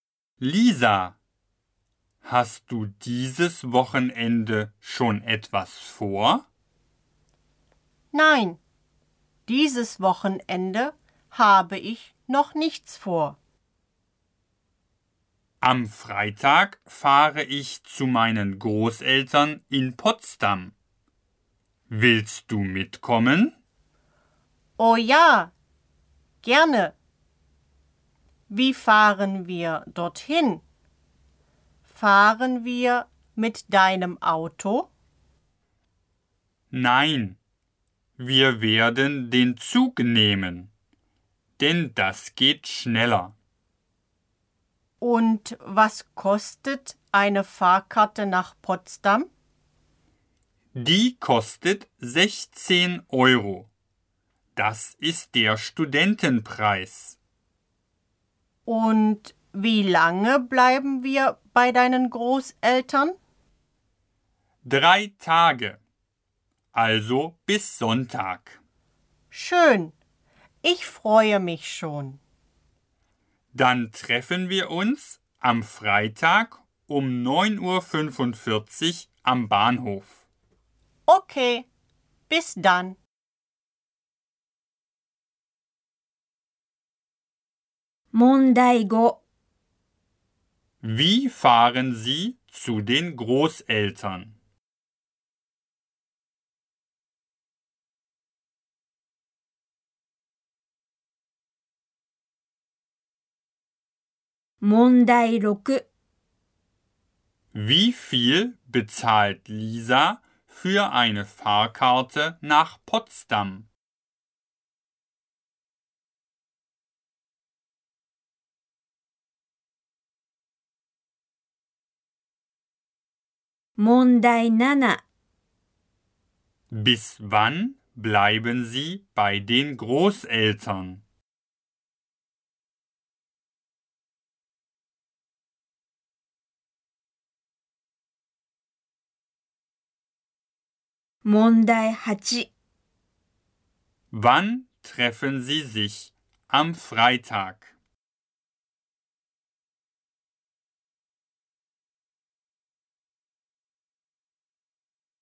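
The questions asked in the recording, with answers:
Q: Wie fahren Sie zu den Großeltern?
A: Mit dem Zug

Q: Wie viel bezahlt Lisa für eine Fahrkarte nach Potsdam?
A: 16 Euro

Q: Bis wann bleiben Sie bei den Großeltern?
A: Bis Sonntag

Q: Wann treffen Sie sich am Freitag?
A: Um 9.45 Uhr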